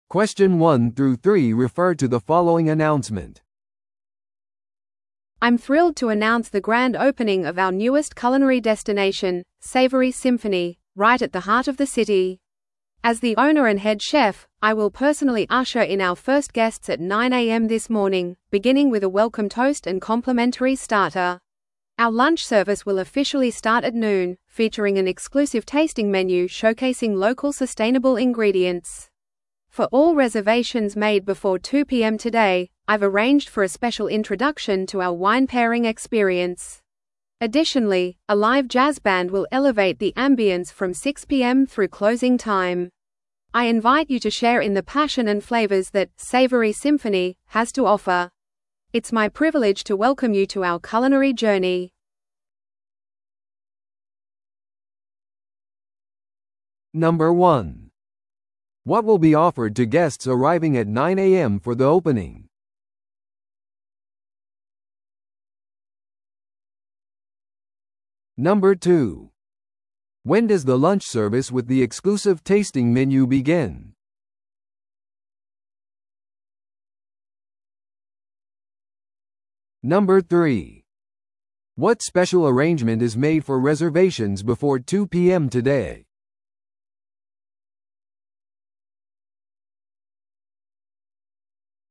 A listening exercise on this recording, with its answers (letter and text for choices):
Listen to the audio below and answer the questions.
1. What will be offered to guests arriving at 9am for the opening?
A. 無料のデザート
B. コーヒーテイスティングセッション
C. ウェルカムトーストと無料のアペタイザー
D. レストランのガイドツアー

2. When does the lunch service with the exclusive tasting menu begin?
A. 午前9時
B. 正午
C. 午後2時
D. 午後6時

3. What special arrangement is made for reservations before 2pm today?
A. 最終請求額の割引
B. 抽選への無料参加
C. 食事時間の延長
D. ワインペアリングへのご案内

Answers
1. C. ウェルカムトーストと無料のアペタイザー
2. B. 正午
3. D. ワインペアリングへのご案内

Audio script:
I'm thrilled to announce the grand opening of our newest culinary destination, 'Savory Symphony,' right at the heart of the city! As the owner and head chef, I will personally usher in our first guests at 9am this morning, beginning with a welcome toast and complimentary starter. Our lunch service will officially start at noon, featuring an exclusive tasting menu showcasing local sustainable ingredients. For all reservations made before 2pm today, I've arranged for a special introduction to our wine pairing experience. Additionally, a live jazz band will elevate the ambiance from 6pm through closing time. I invite you to share in the passion and flavors that 'Savory Symphony' has to offer. It's my privilege to welcome you to our culinary journey.